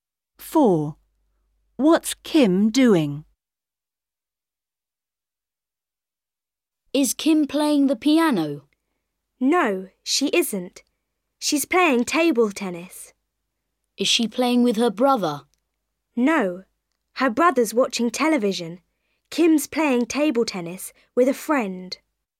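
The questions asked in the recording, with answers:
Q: What's Kim doing?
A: playing table tennis with a friend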